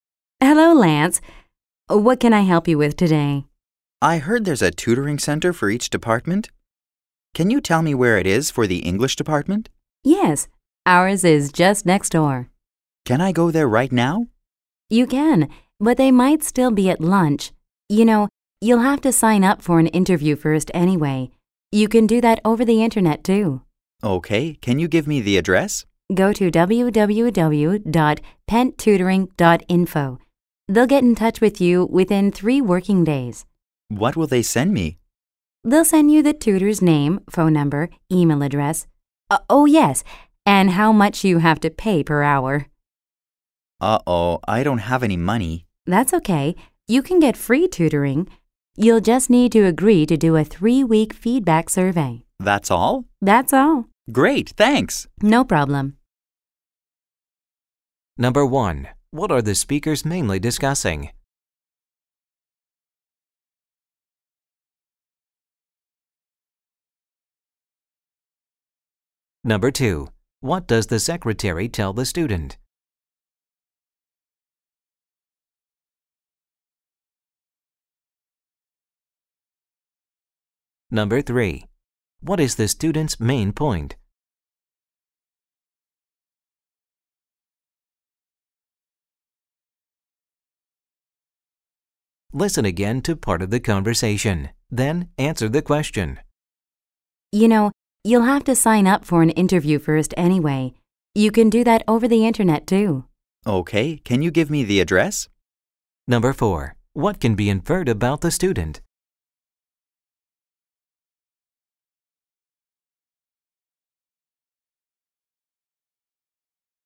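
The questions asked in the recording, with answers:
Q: What are the speakers mainly discussing?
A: How to sign up for tutoring at the English department's tutoring center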